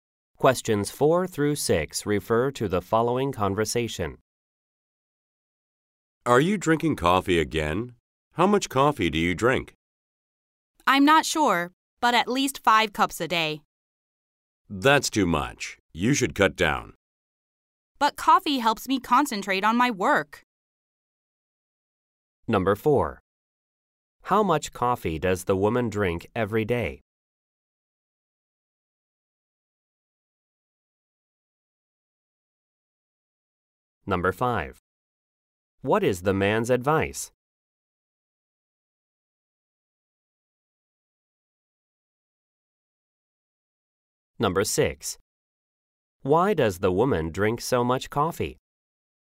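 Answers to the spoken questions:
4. At least 5 cups.
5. Cut down on coffee.
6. It helps her concentrate on her work.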